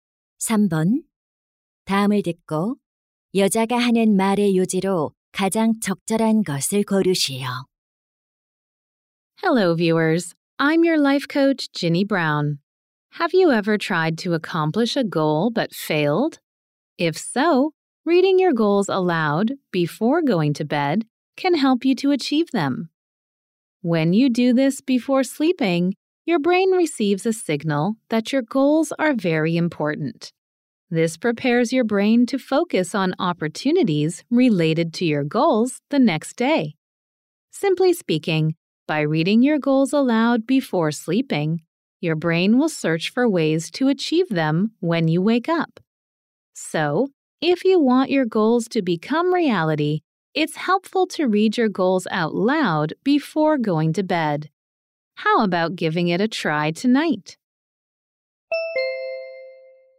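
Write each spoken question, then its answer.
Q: 다음을 듣고 여자가 하는 말의 요지로 가장 적절한 것을 고르시오.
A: 자기 전에 목표를 소리 내어 읽으면 목표 달성에 도움이 된다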